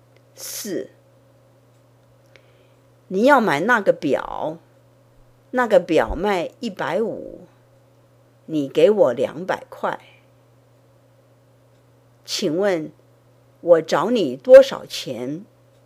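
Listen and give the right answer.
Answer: 50块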